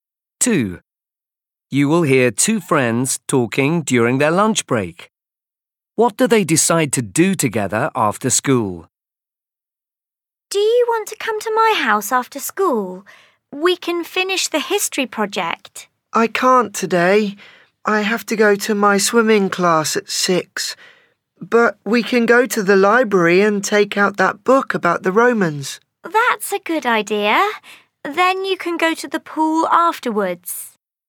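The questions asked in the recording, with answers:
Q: What do they decide to do together after school?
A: go to the library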